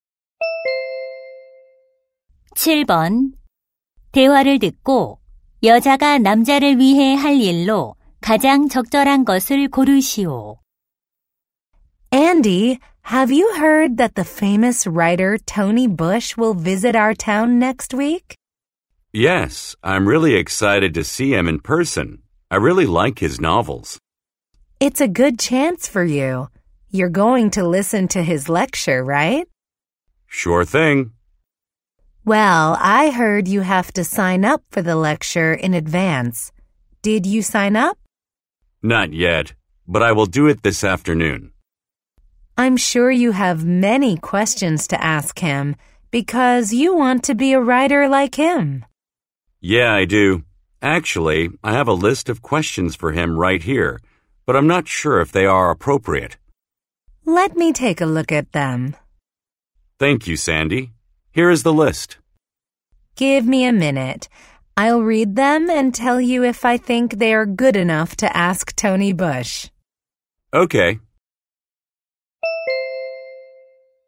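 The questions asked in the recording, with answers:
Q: 대화를 듣고 여자가 남자를 위해 할 일로 가장 적절한 것을 고르시오.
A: 질문 목록 검토해 주기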